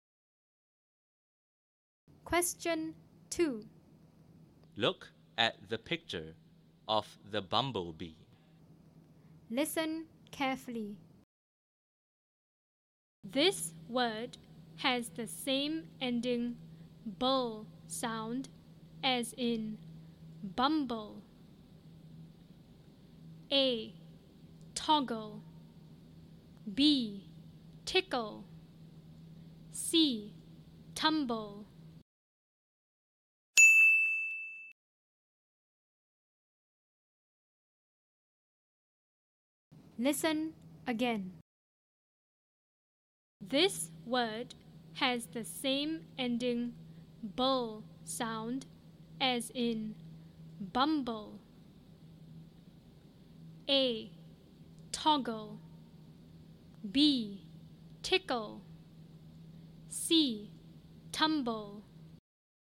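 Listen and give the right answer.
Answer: C: Tumble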